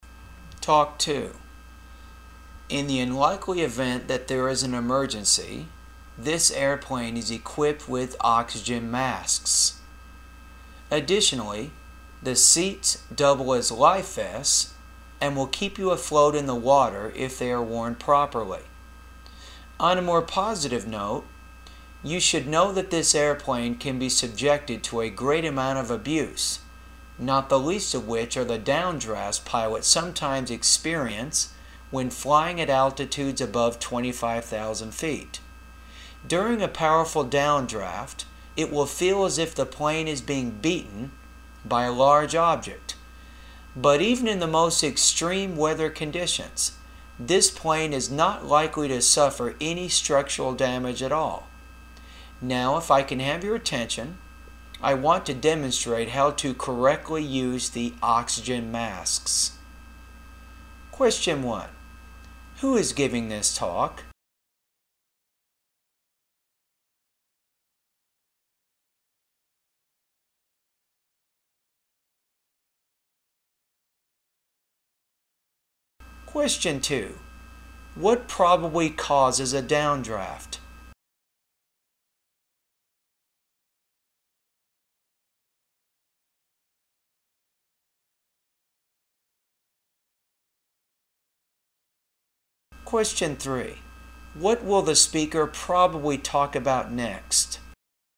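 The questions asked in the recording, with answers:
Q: Who is giving this talk?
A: A flight attendant

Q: What will the speaker probably talk about next?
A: How to correctly use the oxygen masks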